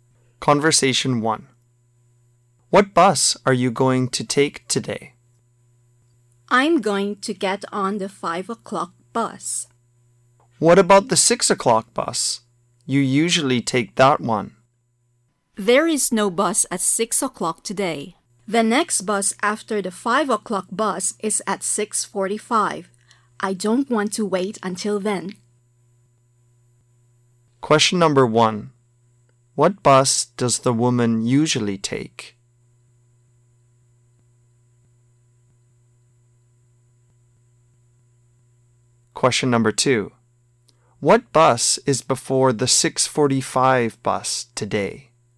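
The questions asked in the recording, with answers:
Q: What bus does the woman usually take?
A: The 6 o'clock bus

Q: What bus is before the 6:45 bus today?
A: The 5 o'clock bus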